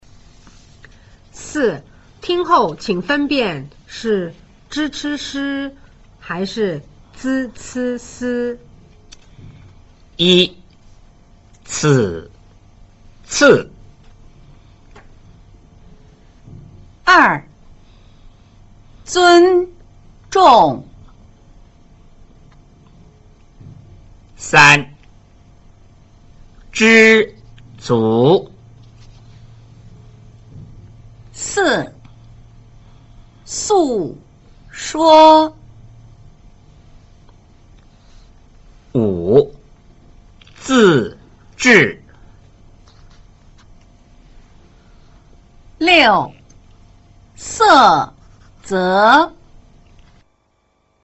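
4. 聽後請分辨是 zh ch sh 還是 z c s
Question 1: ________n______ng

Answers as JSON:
{"1": "z, zh (尊重)"}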